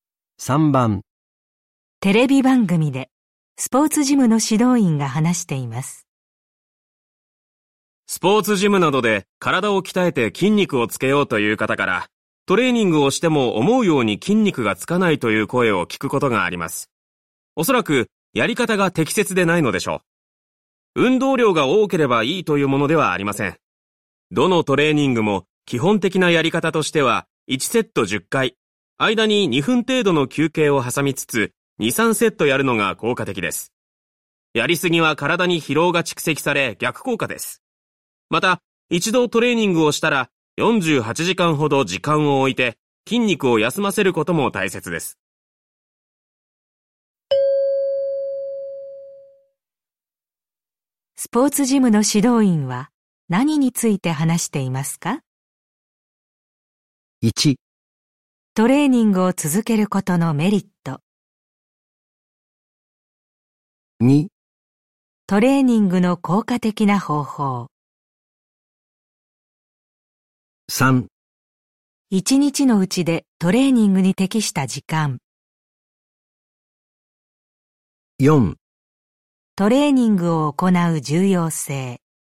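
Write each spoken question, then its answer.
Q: スポーツジムの指導員は何について話していますか?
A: 2: トレーニングの効果的な方法。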